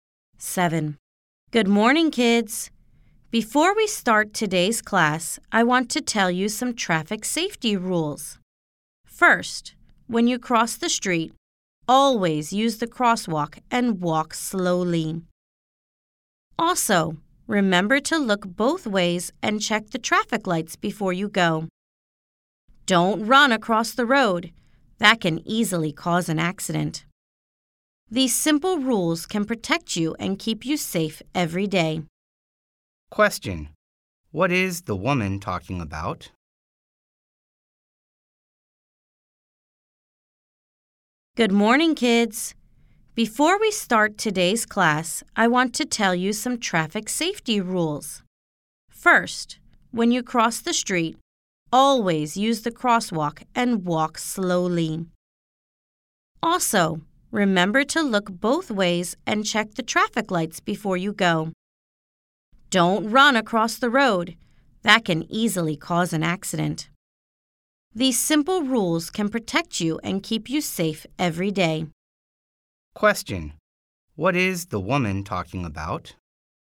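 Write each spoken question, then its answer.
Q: What is the woman talking about?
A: Traffic safety rules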